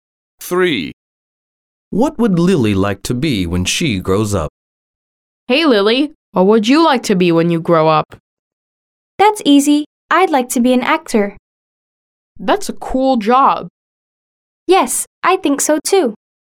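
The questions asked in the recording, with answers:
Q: What would Lily like to be when she grows up?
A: an actor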